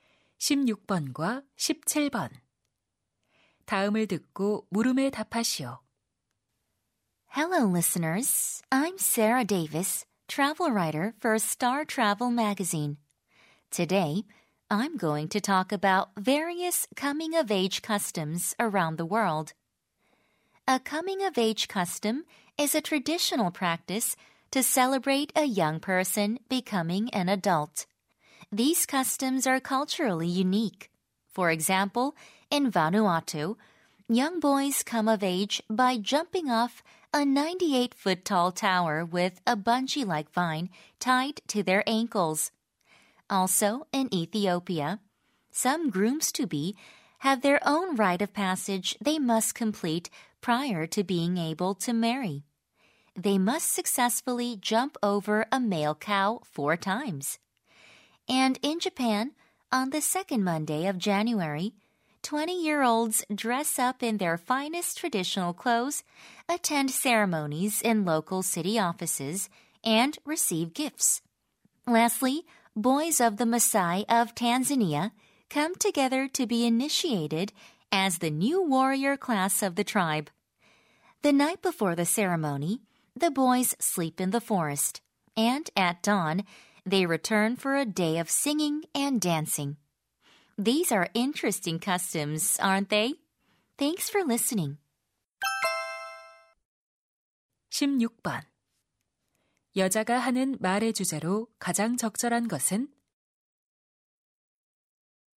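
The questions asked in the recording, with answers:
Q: 여자가 하는 말의 주제로 가장 적절한 것은?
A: 세계 여러 나라의 성인식 풍습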